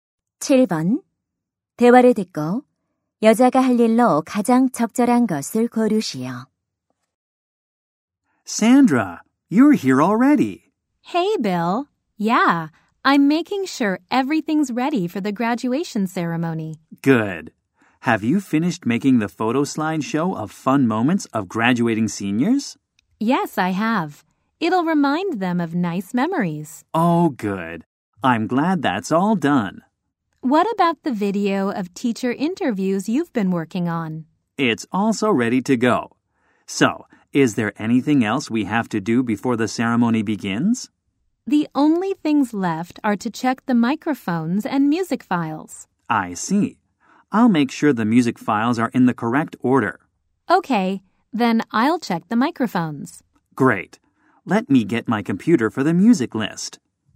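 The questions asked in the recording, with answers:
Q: 대화를 듣고 여자가 할 일로 가장 적절한 것을 고르시오.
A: 마이크 점검하기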